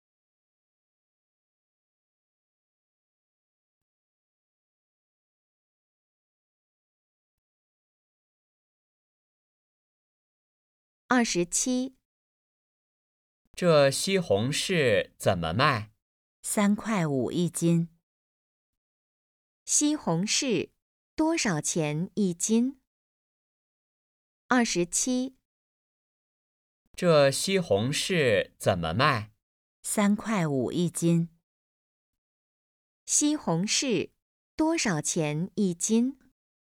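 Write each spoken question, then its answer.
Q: 西红柿多少钱一斤?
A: 三块五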